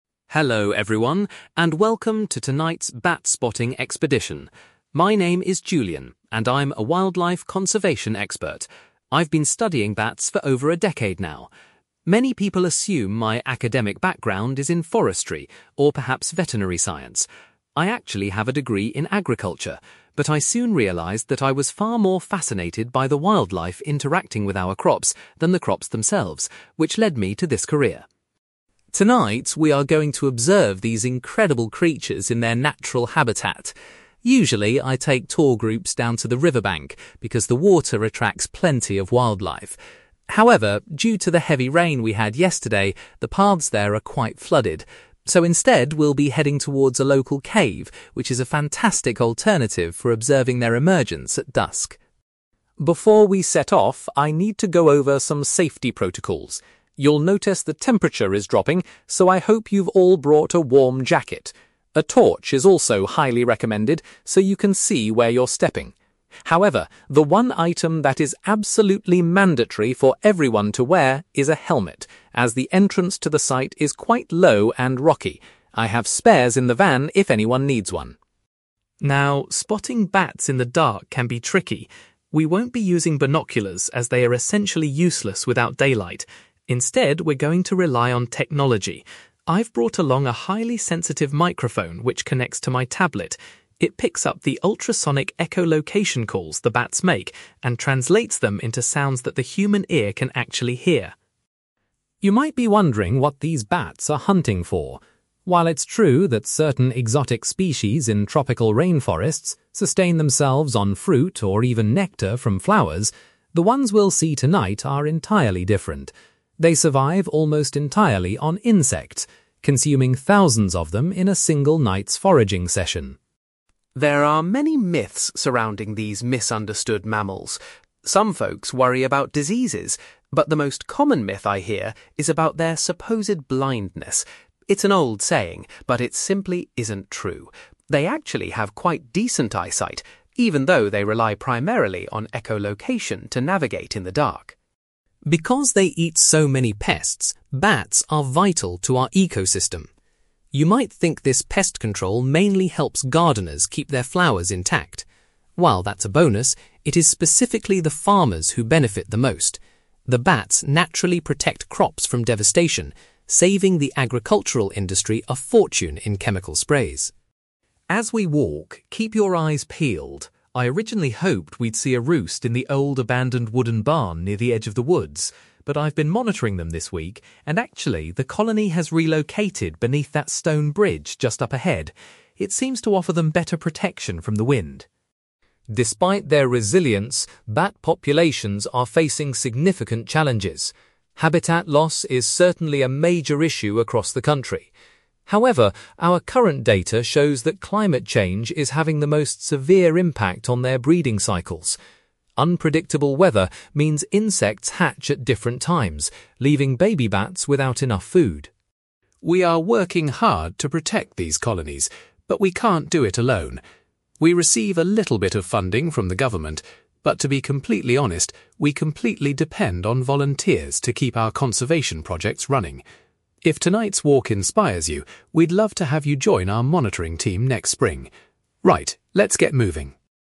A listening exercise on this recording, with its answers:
For questions 9-18, complete the sentences with a word or short phrase.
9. Julian initially studied (9)........................... before deciding to specialise in wildlife conservation.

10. Julian explains that tonight's expedition will take place near a (10)........................... rather than by the river.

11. Julian insists that every participant must wear a (11)........................... for protection during the walk.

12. The group will use a special (12)........................... to detect the sounds made by the bats.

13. Julian notes that the diet of the local bat population consists mostly of (13)........................... .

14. Julian is keen to dispel the widespread myth regarding the bats' (14)........................... .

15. According to Julian, the pest control provided by bats is incredibly valuable to local (15)........................... .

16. Julian reveals that the bat colony has recently moved its roost to a stone (16)........................... .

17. Julian identifies (17)........................... as the greatest current threat to the bats' breeding patterns.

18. Julian stresses that the conservation programme relies entirely on the help of (18)........................... to survive.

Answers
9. agriculture
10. cave
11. helmet
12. microphone
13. insects
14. blindness
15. farmers
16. bridge
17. climate change
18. volunteers

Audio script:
Julian: Hello, everyone, and welcome to tonight's bat-spotting expedition. My name is Julian, and I'm a wildlife conservation expert. I've been studying bats for over a decade now. Many people assume my academic background is in forestry or perhaps veterinary science. I actually have a degree in agriculture, but I soon realised that I was far more fascinated by the wildlife interacting with our crops than the crops themselves, which led me to this career.
Tonight, we are going to observe these incredible creatures in their natural habitat. Usually, I take tour groups down to the riverbank because the water attracts plenty of wildlife. However, due to the heavy rain we had yesterday, the paths there are quite flooded. So instead, we'll be heading towards a local cave, which is a fantastic alternative for observing their emergence at dusk.
Before we set off, I need to go over some safety protocols. You'll notice the temperature is dropping, so I hope you've all brought a warm jacket. A torch is also highly recommended so you can see where you're stepping. However, the one item that is absolutely mandatory for everyone to wear is a helmet, as the entrance to the site is quite low and rocky. I have spares in the van if anyone needs one.
Now, spotting bats in the dark can be tricky. We won't be using binoculars, as they are essentially useless without daylight. Instead, we're going to rely on technology. I've brought along a highly sensitive microphone which connects to my tablet. It picks up the ultrasonic echolocation calls the bats make and translates them into sounds that the human ear can actually hear.
You might be wondering what these bats are hunting for. While it's true that certain exotic species in tropical rainforests sustain themselves on fruit or even nectar from flowers, the ones we'll see tonight are entirely different. They survive almost entirely on insects, consuming thousands of them in a single night's foraging session.
There are many myths surrounding these misunderstood mammals. Some folks worry about diseases, but the most common myth I hear is about their supposed blindness. It's an old saying, but it simply isn't true. They actually have quite decent eyesight, even though they rely primarily on echolocation to navigate in the dark.
Because they eat so many pests, bats are vital to our ecosystem. You might think this pest control mainly helps gardeners keep their flowers intact. While that's a bonus, it is specifically the farmers who benefit the most. The bats naturally protect crops from devastation, saving the agricultural industry a fortune in chemical sprays.
As we walk, keep your eyes peeled. I originally hoped we'd see a roost in the old abandoned wooden barn near the edge of the woods. But I've been monitoring them this week, and actually, the colony has relocated beneath that stone bridge just up ahead. It seems to offer them better protection from the wind.
Despite their resilience, bat populations are facing significant challenges. Habitat loss is certainly a major issue across the country. However, our current data shows that climate change is having the most severe impact on their breeding cycles. Unpredictable weather means insects hatch at different times, leaving baby bats without enough food.
We are working hard to protect these colonies, but we can't do it alone. We receive a little bit of funding from the government, but to be completely honest, we completely depend on volunteers to keep our conservation projects running. If tonight's walk inspires you, we'd love to have you join our monitoring team next spring. Right, let's get moving!

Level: B2